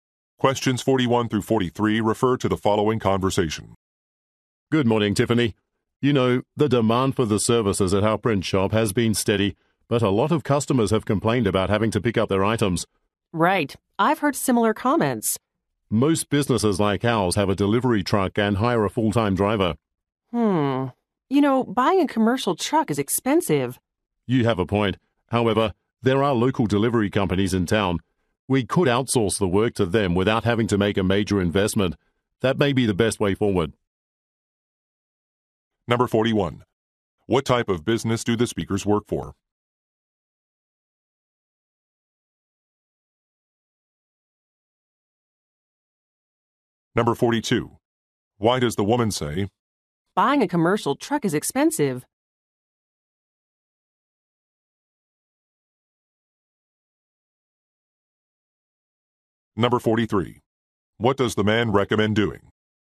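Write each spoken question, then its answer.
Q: What type of business do the speakers work for?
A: A print shop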